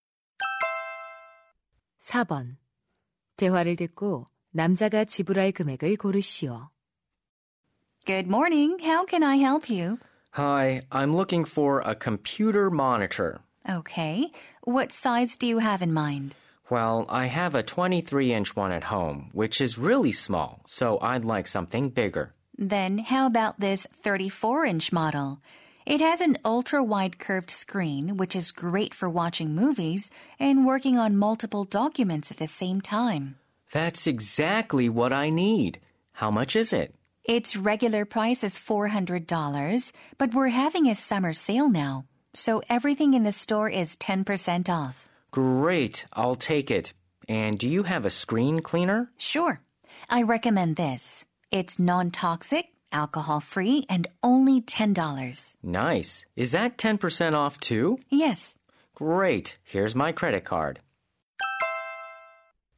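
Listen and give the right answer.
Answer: $369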